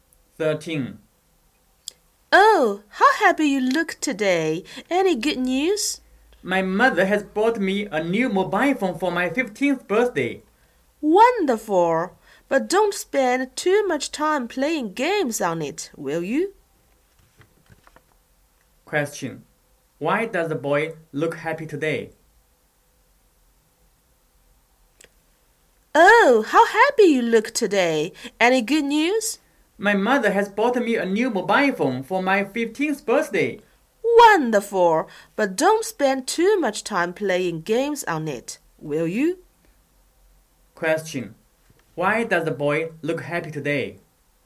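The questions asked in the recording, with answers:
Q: Why does the boy look happy today?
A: His mother bought him a new mobile phone for his birthday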